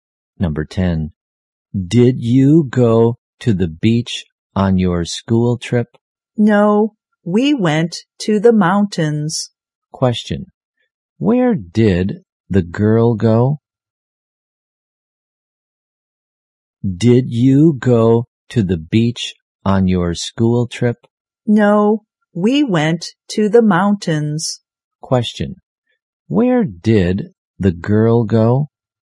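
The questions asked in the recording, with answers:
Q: Where did the girl go?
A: To the mountains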